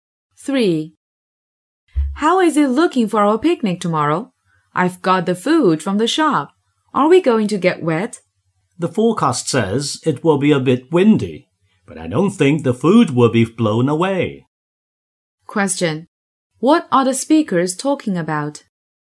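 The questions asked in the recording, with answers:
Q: What are the speakers talking about?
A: The weather for their picnic tomorrow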